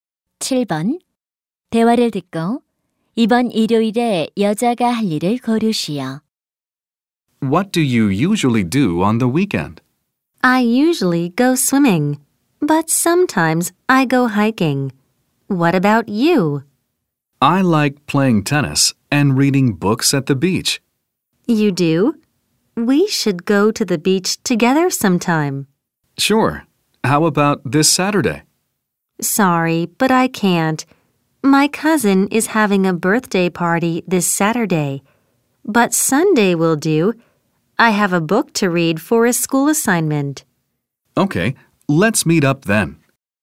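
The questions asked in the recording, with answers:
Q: 대화를 듣고 이번 일요일에 여자가 할 일을 고르시오.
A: 해변에서 책 읽기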